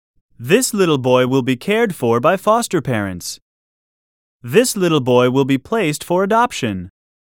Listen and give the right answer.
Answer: Different is the correct answer.